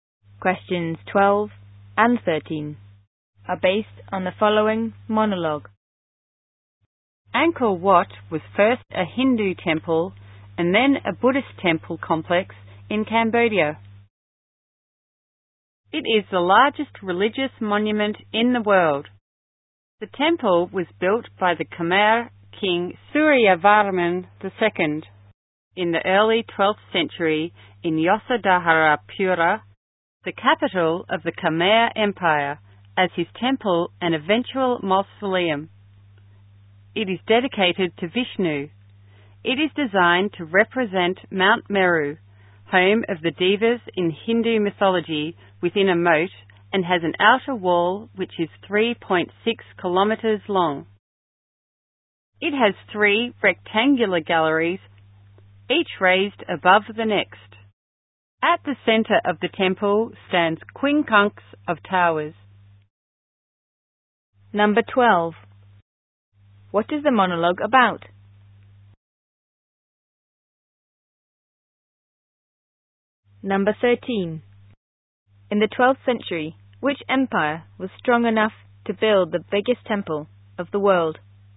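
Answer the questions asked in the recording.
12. Angkor Wat temple
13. The Khmer Empire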